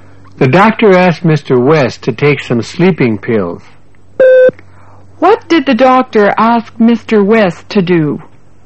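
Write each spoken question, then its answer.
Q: What did the doctor ask Mr. West to do?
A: To take some sleeping pills.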